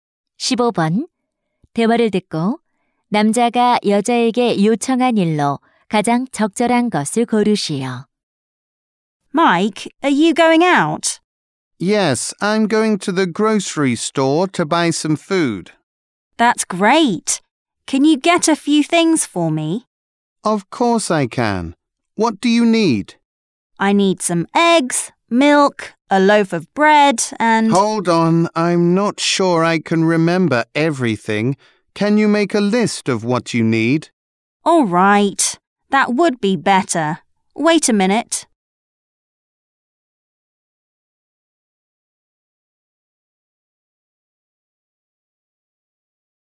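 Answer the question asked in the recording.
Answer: 필요한 물건 목록 작성하기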